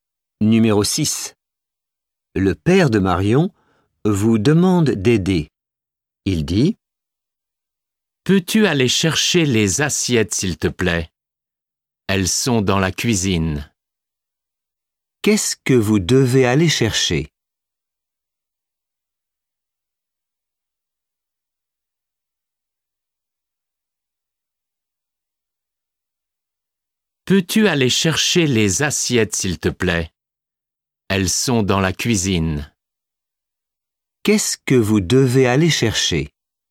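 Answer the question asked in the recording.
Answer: Les assiettes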